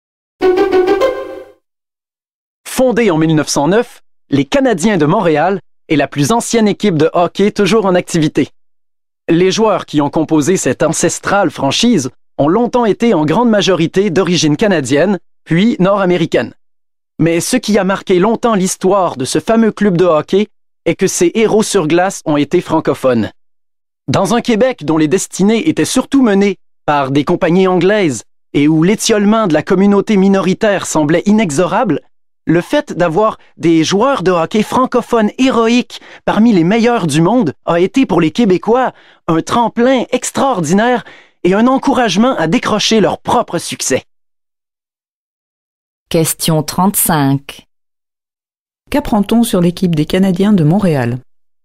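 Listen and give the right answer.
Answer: Ses héros francophones ont encouragé les Québécois à réussir.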